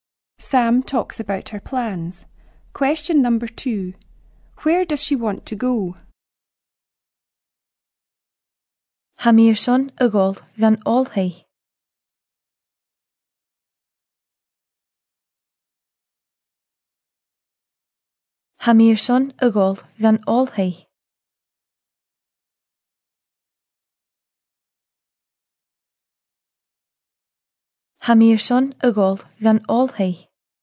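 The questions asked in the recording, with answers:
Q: Where does she want to go?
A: To university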